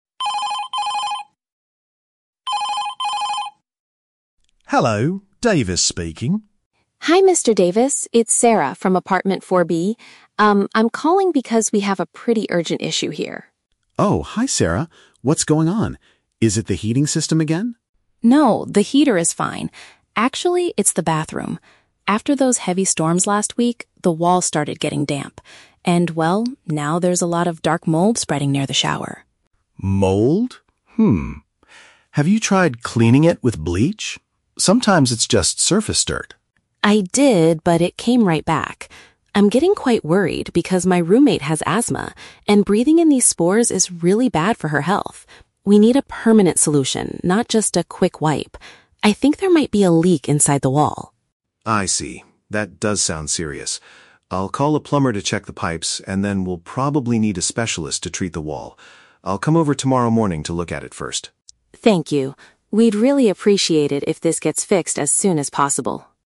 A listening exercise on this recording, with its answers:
Listen to the telephone conversation between a tenant and her landlord. Then, choose the correct answer (A, B, or C) for each question.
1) Why is the tenant contacting her landlord?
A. To complain about a broken heating system in the apartment.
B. To report a dangerous fungal growth in the washroom.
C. To ask for someone to repair a broken window after a storm.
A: B. To report a dangerous fungal growth in the washroom.

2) What is the tenant's main concern about the situation?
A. It could cause medical issues for the person living with her.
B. It is too difficult to clean with normal household chemicals.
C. It will permanently damage the paint inside the bathroom.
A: A. It could cause medical issues for the person living with her.

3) What will Mr. Davis do tomorrow morning?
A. Bring some bleach to wipe down the dirty walls.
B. Send a professional plumber to fix the leaking pipes.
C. Inspect the damage himself before calling for repairs.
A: C. Inspect the damage himself before calling for repairs.

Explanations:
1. Sarah is calling to report that "there's a lot of dark mold spreading near the shower". Option B uses paraphrasing (fungal growth = mold; washroom = bathroom). Option A is the trap: Mr. Davis asks if it is the "heating system," but Sarah rejects this by saying, "No, the heater is fine." Option C is plausible after a storm but is never mentioned.
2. Sarah says, "my roommate has asthma, and breathing in these spores is really bad for her health." Option A paraphrases this perfectly (medical issues = bad for her health; person living with her = roommate). Option B is a trap: they discuss cleaning with bleach, but she already did it and that is not her main concern (health is). Option C is not mentioned.
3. At the end, Mr. Davis says, "I'll come over tomorrow morning to look at it first." This matches Option C (inspect the damage himself). Option A is a trap using the keyword "bleach," which was a rejected idea earlier. Option B is a trap: he will call a plumber, but tomorrow morning he is coming to "look at it first."

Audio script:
Mr. Davis: Hello, Davis speaking.
Sarah: Hi Mr. Davis, it's Sarah from apartment 4B. Um, I'm calling because we have a pretty urgent issue here.
Mr. Davis: Oh, hi Sarah. What's going on? Is it the heating system again?
Sarah: No, the heater is fine. Actually, it's the bathroom. After those heavy storms last week, the wall started getting damp. And, well, now there's a lot of dark mold spreading near the shower.
Mr. Davis: Mold? Have you tried cleaning it with bleach? Sometimes it's just surface dirt.
Sarah: I did, but it came right back. I'm getting quite worried because my roommate has asthma, and breathing in these spores is really bad for her health. We need a permanent solution, not just a quick wipe. I think there might be a leak inside the wall.
Mr. Davis: I see. That does sound serious. I'll call a plumber to check the pipes, and then we'll probably need a specialist to treat the wall. I'll come over tomorrow morning to look at it first.

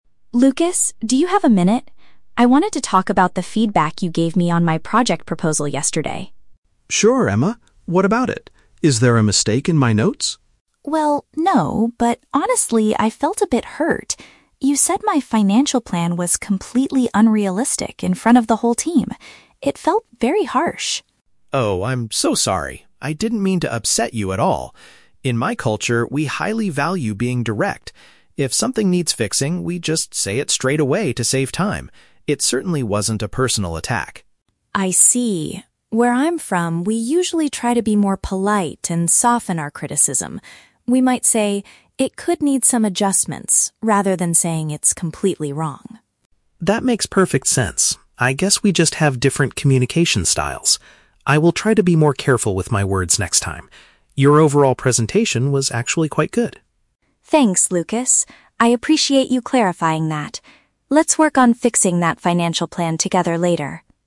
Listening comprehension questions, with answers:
Listen to the conversation between two international colleagues. Choose the correct answer (A, B, or C) for each question.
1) Why did Emma feel upset with Lukas?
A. He found a mathematical error in her financial report.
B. He expressed his criticism in a very blunt and public manner.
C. He refused to help her complete the project proposal.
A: B. He expressed his criticism in a very blunt and public manner.

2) How does Lukas explain his behavior?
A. He claims that speaking openly and directly is a standard norm in his home country.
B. He admits he was stressed because the team was running out of time.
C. He believes that Emma's overall presentation was poorly prepared.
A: A. He claims that speaking openly and directly is a standard norm in his home country.

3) What does Emma suggest people from her culture normally do when giving feedback?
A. They write their negative comments down in an email instead of speaking.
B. They use gentle language to make negative comments sound less severe.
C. They focus entirely on the positive aspects of the presentation to avoid conflict.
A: B. They use gentle language to make negative comments sound less severe.

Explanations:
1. Emma felt hurt because Lukas called her plan "completely unrealistic" (blunt) "in front of the whole team" (public manner). Option (A) is a trap; Lukas asks if there is a "mistake" in his notes, but Emma says "no." Option (C) is a trap; at the end, Emma suggests they "work on fixing that financial plan together," meaning he didn't refuse to help.
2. Lukas explains, "In my culture, we highly value being direct" (speaking openly is a norm). Option (B) is a trap; he mentions saying things straight away to "save time", but he wasn't stressed because they were running out of time. Option (C) is a trap; Lukas explicitly states her overall presentation was "actually quite good", not poorly prepared.
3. Emma says people in her culture try to "soften our criticism" (make negative comments sound less severe). Option (A) is not mentioned in the audio. Option (C) is a trap; she gives an example of how they criticize ("It could need some adjustments"), meaning they do give negative feedback, they just don't focus entirely on the positive.

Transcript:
Emma: Lukas, do you have a minute? I wanted to talk about the feedback you gave me on my project proposal yesterday.
Lukas: Sure, Emma. What about it? Is there a mistake in my notes?
Emma: Well, no. But honestly, I felt a bit hurt. You said my financial plan was "completely unrealistic" in front of the whole team. It felt very harsh.
Lukas: Oh, I'm so sorry! I didn't mean to upset you at all. In my culture, we highly value being direct. If something needs fixing, we just say it straight away to save time. It certainly wasn't a personal attack.
Emma: I see. Where I'm from, we usually try to be more polite and soften our criticism. We might say, "It could need some adjustments," rather than saying it's completely wrong.
Lukas: That makes perfect sense. I guess we just have different communication styles. I will try to be more careful with my words next time. Your overall presentation was actually quite good.
I appreciate you clarifying that. Let's work on fixing that financial plan together later.

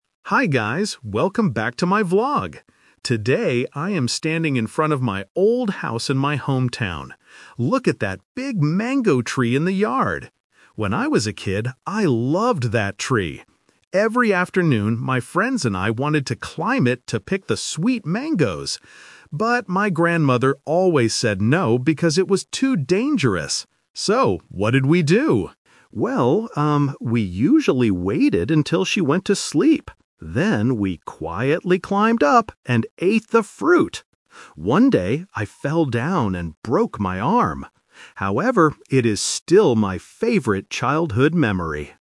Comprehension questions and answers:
Listen to a travel vlogger talking in front of his old house. Then, read the questions below and choose the correct answer (A, B, or C) for each question.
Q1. Why did the grandmother tell the children NOT to climb the tree?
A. She wanted to sleep.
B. She thought it was dangerous.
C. She wanted to eat the mangoes herself.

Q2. What did the children do when the grandmother went to sleep?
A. They climbed the tree to get fruit.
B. They went to sleep too.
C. They went to play in the park.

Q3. What happened to the vlogger one day?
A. He got sick from eating too many mangoes.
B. He fell out of the tree and broke his arm.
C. He broke a window with a mango.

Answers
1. B. She thought it was dangerous.
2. A. They climbed the tree to get fruit.
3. B. He fell out of the tree and broke his arm.

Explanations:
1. The vlogger clearly says, "But, my grandmother always said no because it was too dangerous." Option (A) is a trap; the grandmother did go to sleep later, but that was not her reason for saying no. Option (C) is a plausible reason for not sharing food, but it is never mentioned in the audio.
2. The vlogger says, "...we usually waited until she went to sleep. Then, we quietly climbed up and ate the fruit!" Option (B) is a trap; the word "sleep" is mentioned, but only the grandmother slept, not the children. Option (C) is a plausible childhood activity, but it is not mentioned.
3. The vlogger states, "One day, I fell down and broke my arm." Option (A) is a trap; he ate the fruit, but he didn't get sick from it. Option (C) is a plausible accident for a child playing outside, but it is never mentioned in the story.

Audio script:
Hi guys, welcome back to my vlog! Today, I am standing in front of my old house in my hometown. Look at that big mango tree in the yard! When I was a kid, I loved that tree. Every afternoon, my friends and I wanted to climb it to pick the sweet mangoes. But, my grandmother always said no because it was too dangerous. So, what did we do? Well, um, we usually waited until she went to sleep. Then, we quietly climbed up and ate the fruit! One day, I fell down and broke my arm. However, it is still my favorite childhood memory.

